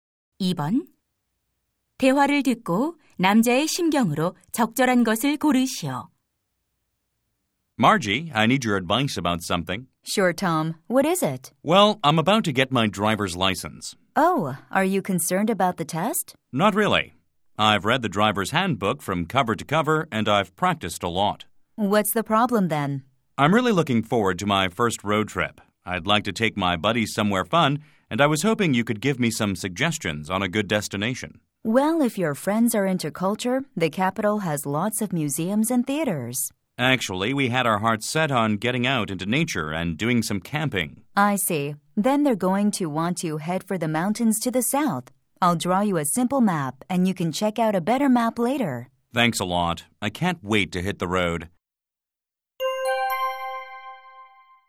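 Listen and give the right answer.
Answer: 설렘, 기대됨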